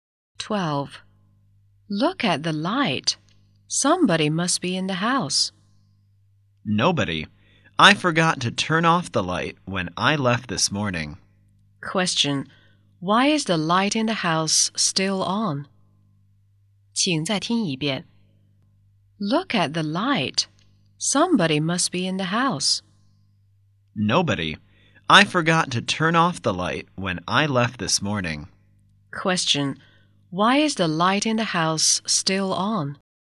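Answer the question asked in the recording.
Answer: The speaker forgot to turn it off that morning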